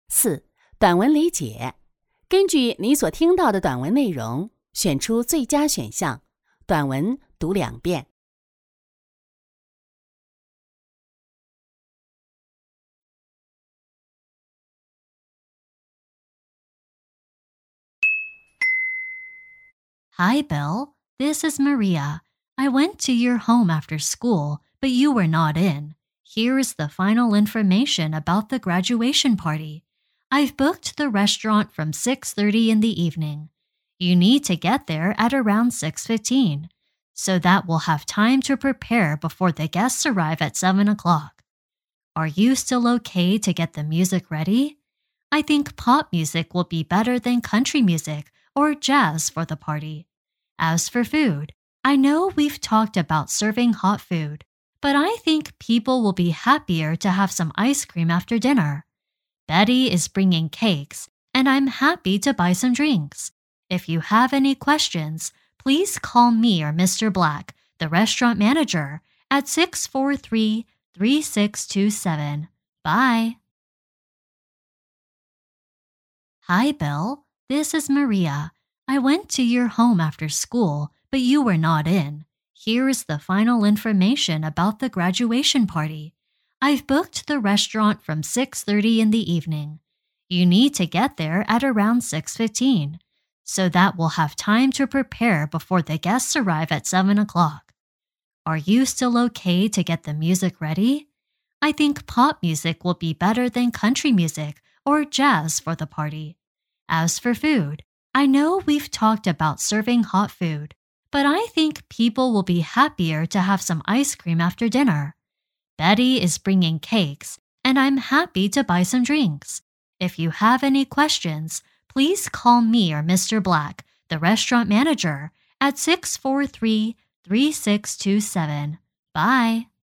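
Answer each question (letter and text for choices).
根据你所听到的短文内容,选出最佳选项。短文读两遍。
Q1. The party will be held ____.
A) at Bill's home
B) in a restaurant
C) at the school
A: B) in a restaurant

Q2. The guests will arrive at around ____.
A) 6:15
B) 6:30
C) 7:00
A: C) 7:00

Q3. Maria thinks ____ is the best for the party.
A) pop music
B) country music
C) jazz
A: A) pop music

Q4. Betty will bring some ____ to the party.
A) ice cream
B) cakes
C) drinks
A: B) cakes

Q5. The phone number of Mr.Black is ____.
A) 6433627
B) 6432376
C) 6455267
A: A) 6433627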